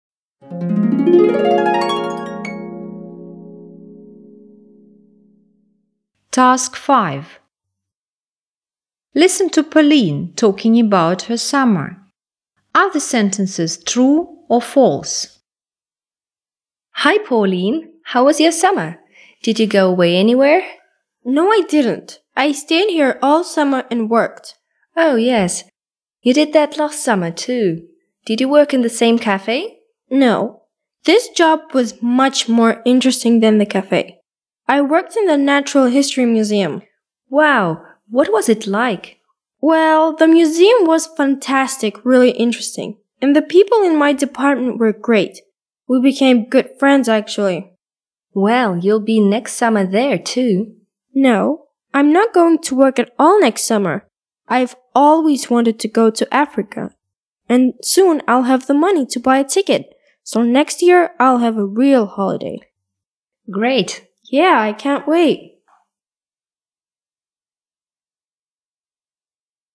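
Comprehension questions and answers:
Task 5. Listen to Pauline talking about her summer. Are the sentences true (T) or false (F)?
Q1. She went away for all summer.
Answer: F

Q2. She didn't like her new job.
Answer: F

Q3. She liked the people who worked with her.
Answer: T

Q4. She's going to travel next summer.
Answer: T

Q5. She doesn't have money to buy a ticket now.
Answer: T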